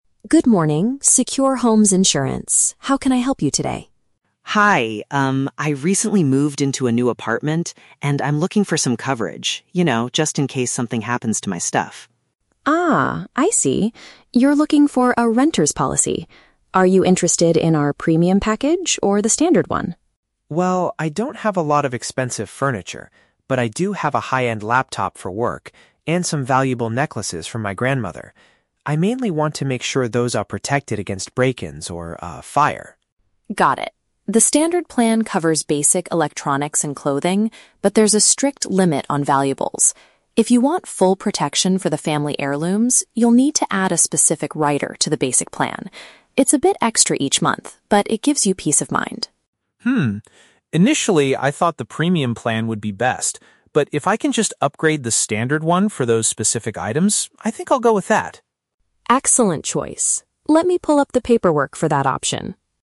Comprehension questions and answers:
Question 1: Why is the man calling the insurance agency?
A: To buy an insurance policy for his personal belongings.

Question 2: What specific items is the caller most worried about protecting?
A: His computer and family jewelry.

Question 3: Which insurance option does the caller finally choose?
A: The basic plan with an extra add-on.

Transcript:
Insurance Agent: Good morning, Secure Homes Insurance. How can I help you today?
Renter: Hi, um, I recently moved into a new apartment, and I'm looking for some coverage... you know, just in case something happens to my stuff.
Insurance Agent: Ah, I see. You're looking for a renter's policy. Are you interested in our premium package or the standard one?
Renter: Well, I don't have a lot of expensive furniture. But I do have a high-end laptop for work, and some valuable necklaces from my grandmother. I mainly want to make sure those are protected against break-ins or, ah, fire.
Insurance Agent: Got it. The standard plan covers basic electronics and clothing, but there's a strict limit on valuables. If you want full protection for the family heirlooms, you'll need to add a specific rider to the basic plan. It's a bit extra each month, but it gives you peace of mind.
Initially, I thought the premium plan would be best, but if I can just upgrade the standard one for those specific items, I think I'll go with that.